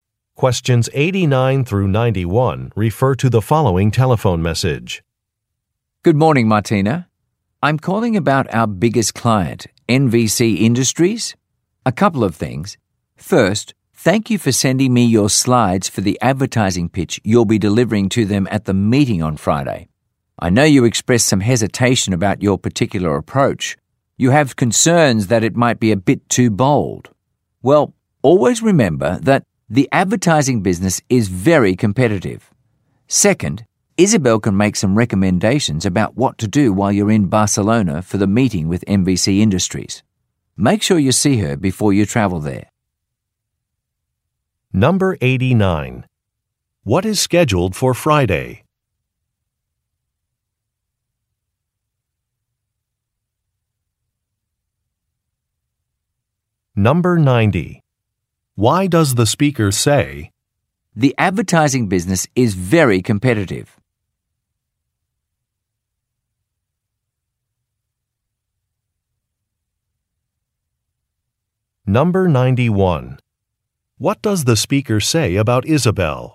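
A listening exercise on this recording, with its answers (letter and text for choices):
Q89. What is scheduled for Friday?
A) A job fair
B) A wellness workshop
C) A client meeting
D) An employee luncheon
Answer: C) A client meeting

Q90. Why does the speaker say, "the advertising business is very competitive"?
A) To explain a decision to retire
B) To justify an employee's promotion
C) To question the listener's abilities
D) To express confidence in an approach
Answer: D) To express confidence in an approach

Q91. What does the speaker say about Isabel?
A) She has recently joined the company.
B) She can recommend some activities.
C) She will approve expense reports.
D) She used to work on the NVC Industries account.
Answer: B) She can recommend some activities.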